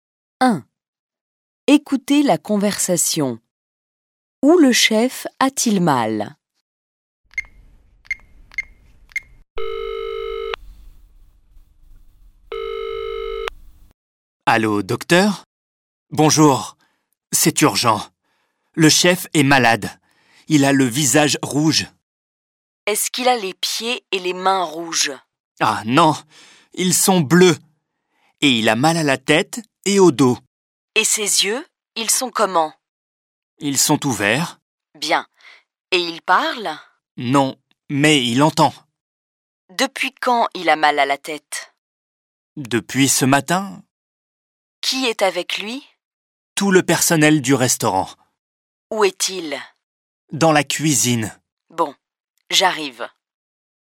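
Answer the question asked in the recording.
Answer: À la tête et au dos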